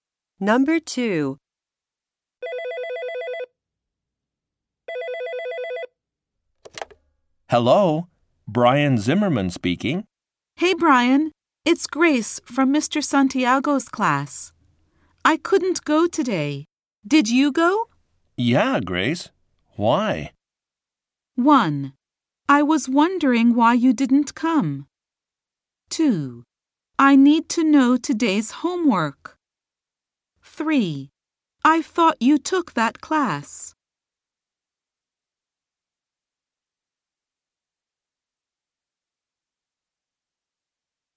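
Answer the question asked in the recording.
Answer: 2: I need to know today's homework.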